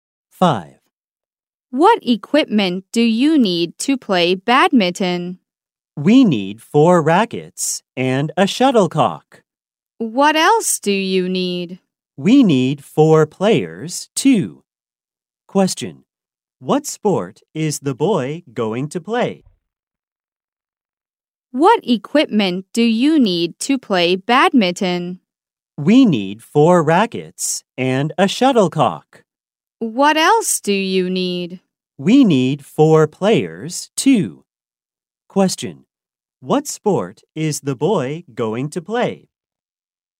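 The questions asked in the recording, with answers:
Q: What sport is the boy going to play?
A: Badminton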